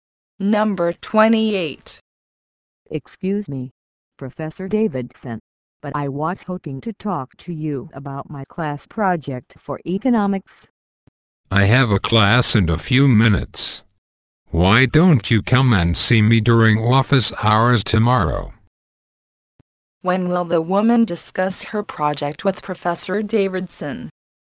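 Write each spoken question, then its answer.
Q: When will the woman discuss her project with Professor Davidson?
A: Tomorrow, during his office hours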